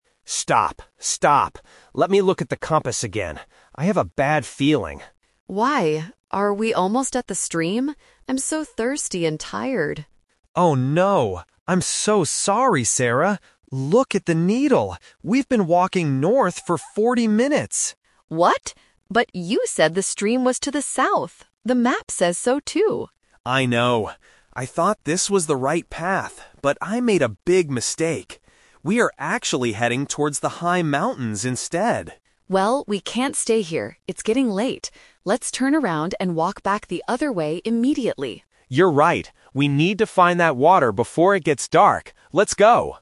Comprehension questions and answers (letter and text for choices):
Listen to the conversation between two hikers and choose the correct answer (A, B, or C).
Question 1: How long have the hikers been walking in the wrong direction?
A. Fourteen minutes.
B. Forty minutes.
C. One hour.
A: B. Forty minutes.

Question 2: Where are the hikers heading right now?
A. Towards the stream.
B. Towards the South.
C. Towards the mountains.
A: C. Towards the mountains.

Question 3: What is the hikers' final decision?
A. To stay where they are and wait.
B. To turn around and find the stream.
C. To continue walking North.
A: B. To turn around and find the stream.

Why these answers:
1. Why B is correct: Hiker A says: "We've been walking North for forty minutes!" Why A is a trap:"Fourteen" (14) and "Forty" (40) are the most easily confused sounds at the A2 level. Why C is wrong: "One hour" is not mentioned in the text.
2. Why C is correct: Hiker A confirms their current location: "We are actually heading towards the high mountains instead." Why A is a trap: This is where they want to go, not where they are going. Why B is a trap: South is the correct direction according to the map, but they are going north.
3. Why B is correct: Đây là kỹ thuật "The Twist". Sau khi nhận ra lỗi sai, họ quyết định: "Let's turn around and walk back the other way." Why A is wrong: The female character says, "We can't stay here." Why C is a trap: This is the wrong direction they went, and they decide to stop and turn back.

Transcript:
Hiker A (Man): Stop, stop! Let me look at the compass again. I have a bad feeling.
Hiker B (Woman): Why? Are we almost at the stream? I'm so thirsty and tired.
Hiker A: Oh, no... I'm so sorry, Sarah. We've been walking North for forty minutes!
Hiker B: What? But you said the stream was to the South. The map says so, too!
Hiker A: I know. I thought this was the right path, but I made a big mistake. We are actually heading towards the high mountains instead.
Hiker B: Well, we can't stay here. It's getting late. Let's turn around and walk back the other way immediately.